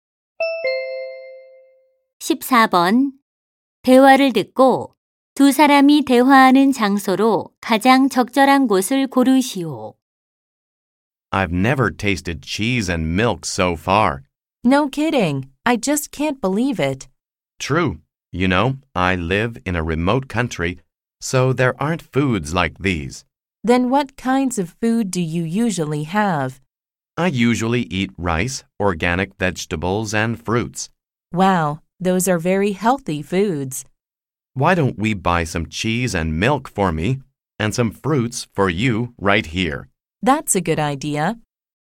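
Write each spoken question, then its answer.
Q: 대화를 듣고 두 사람이 대화하는 장소로 가장 적절한 곳을 고르시오.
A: 식료품점 (슈퍼마켓)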